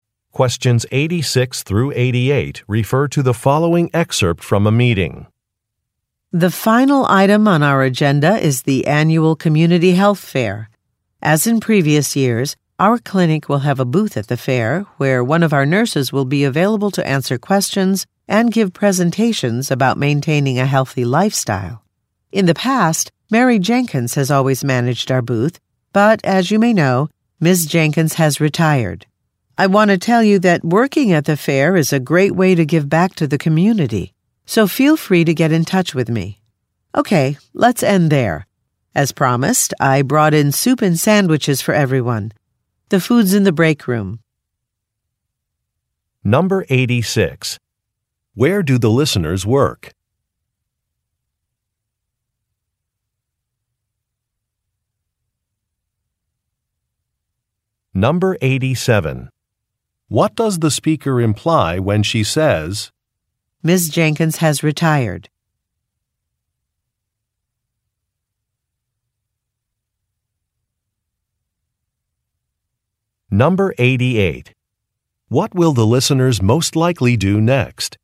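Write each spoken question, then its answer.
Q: Where do the listeners work?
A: At a clinic

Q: What does the speaker imply when she says,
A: A new nurse is needed to manage the booth at the health fair

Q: What will the listeners most likely do next?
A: Eat lunch in the break room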